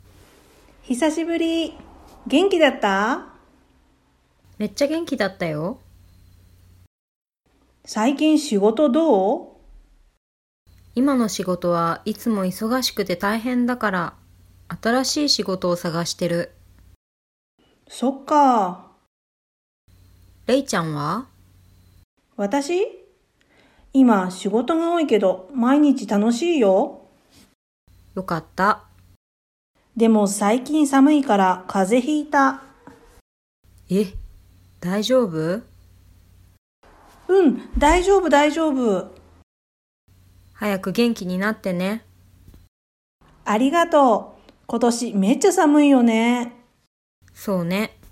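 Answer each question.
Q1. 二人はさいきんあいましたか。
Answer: いいえ、ひさしぶりです。

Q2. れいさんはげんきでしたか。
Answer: はい、げんきでした。

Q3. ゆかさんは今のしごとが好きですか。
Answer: いいえ、いそがしくてたいへんなので、あたらしいしごとをさがしています。

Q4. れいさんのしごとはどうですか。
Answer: しごとが多いですが、毎日楽しいです。

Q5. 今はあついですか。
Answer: いいえ、さむいです。

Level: Extension JLPT5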